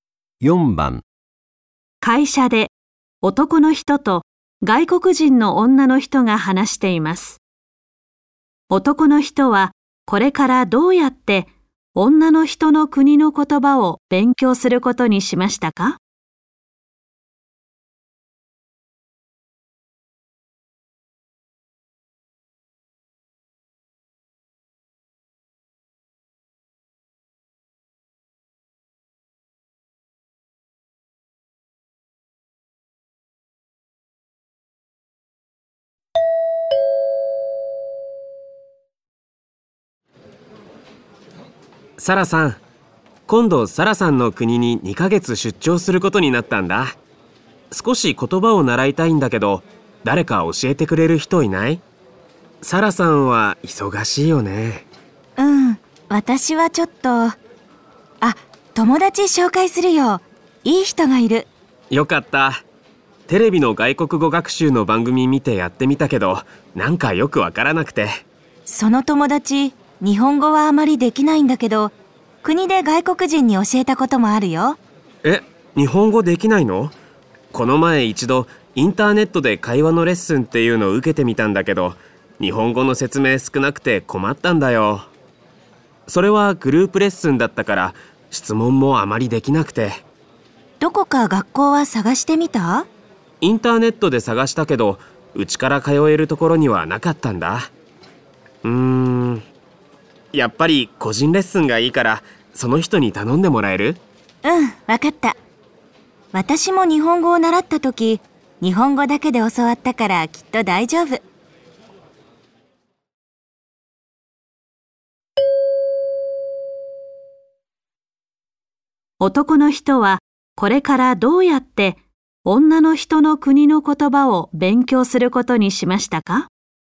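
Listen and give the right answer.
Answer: サラさんの友達に個人レッスンを受ける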